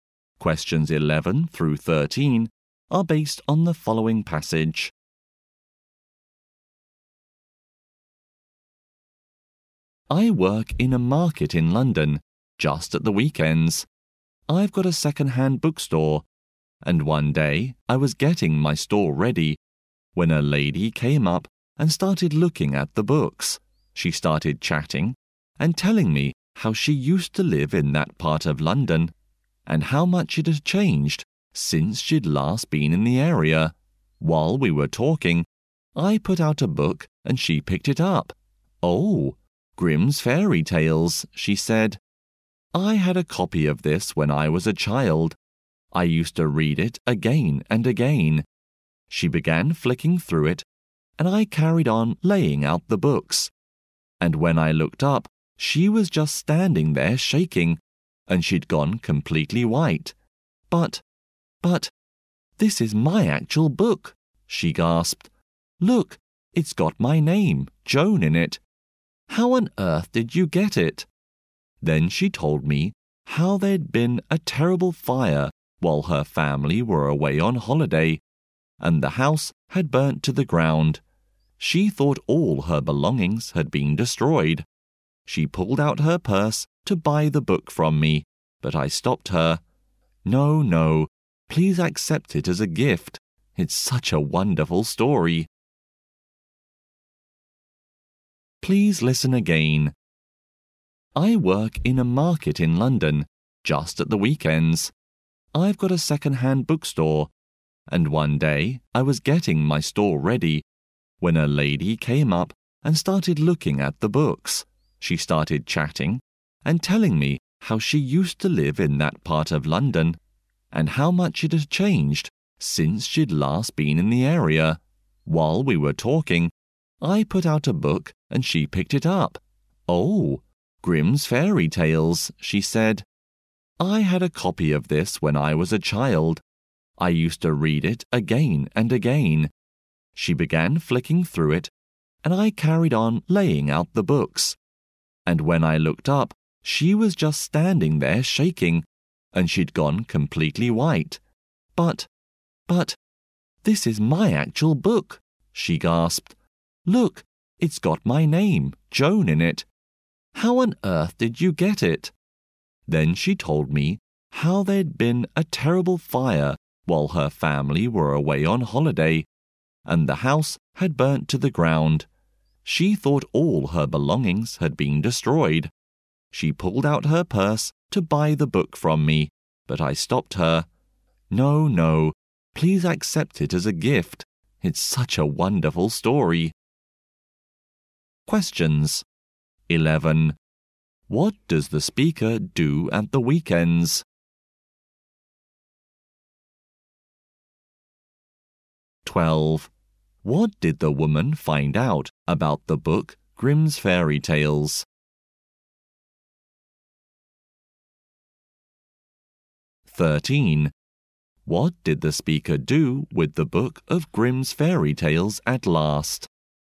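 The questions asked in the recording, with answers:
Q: What does the speaker do at the weekends?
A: Runs a second-hand bookstore in a London market

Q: What did the woman find out about the book Grimm's Fairy Tales?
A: It was her own childhood copy, with her name in it

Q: What did the speaker do with the book of Grimm's Fairy Tales at last?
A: Gave it to her as a gift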